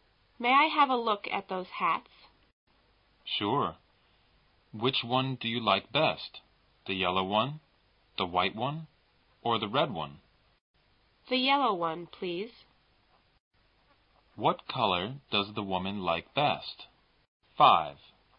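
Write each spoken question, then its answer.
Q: What color does the woman like best?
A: Yellow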